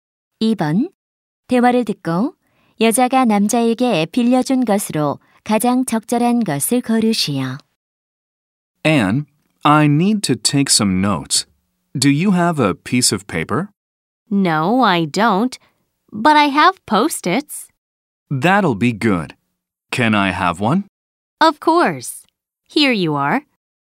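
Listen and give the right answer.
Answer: 포스트잇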